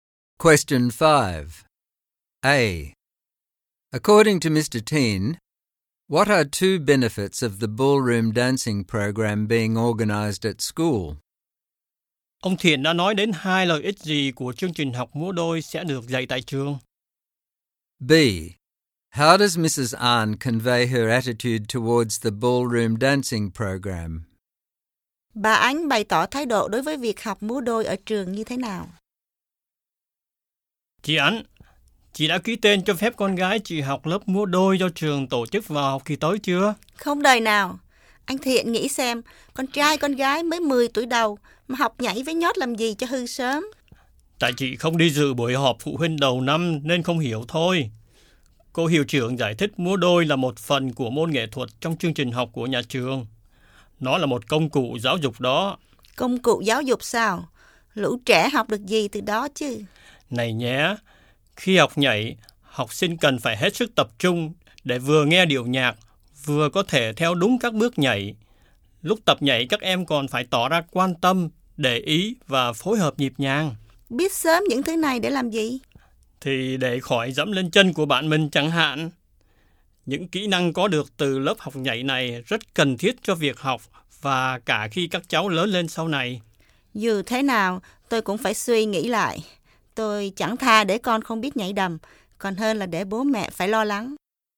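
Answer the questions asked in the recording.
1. Học sinh rèn luyện sự tập trung (vừa nghe nhạc vừa theo đúng bước nhảy) và biết quan tâm, phối hợp nhịp nhàng với bạn; đây là những kỹ năng cần cho việc học và cho cuộc sống sau này
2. Bà phản đối mạnh mẽ ("Không đời nào"), cho rằng trẻ 10 tuổi học nhảy sẽ sớm hư, hỏi lại một cách mỉa mai và thà để con không biết nhảy còn hơn để bố mẹ lo lắng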